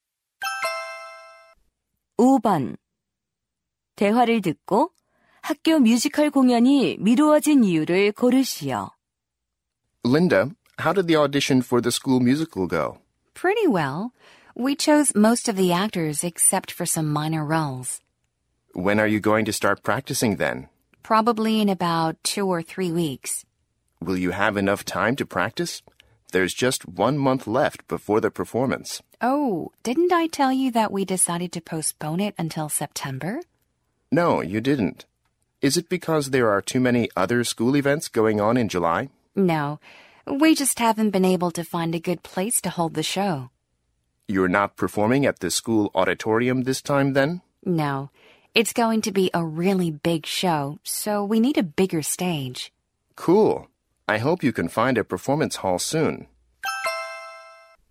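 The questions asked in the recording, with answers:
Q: 대화를 듣고 학교 뮤지컬 공연이 미루어진 이유를 고르시오.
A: 공연할 장소를 찾지 못해서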